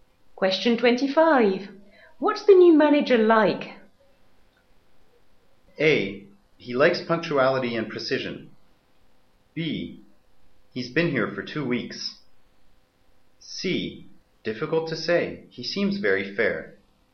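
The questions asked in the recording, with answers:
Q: What's the new manager like?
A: C: Difficult to say. He seems very fair.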